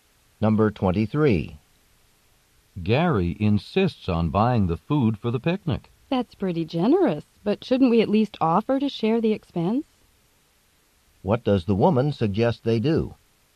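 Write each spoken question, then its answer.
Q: What does the woman suggest they do?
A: Offer to share the cost of the picnic food with Gary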